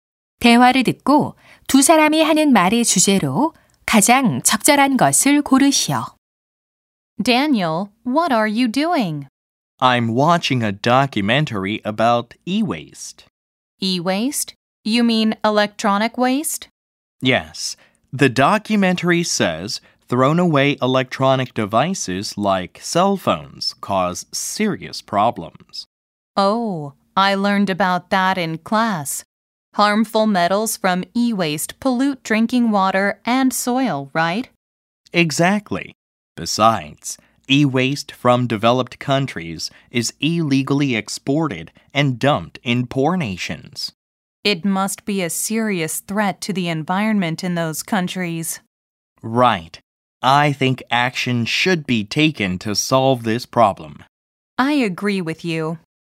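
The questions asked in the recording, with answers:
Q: 대화를 듣고 두 사람이 하는 말의 주제로 가장 적절한 것을 고르시오.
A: 전자 폐기물이 일으키는 심각한 문제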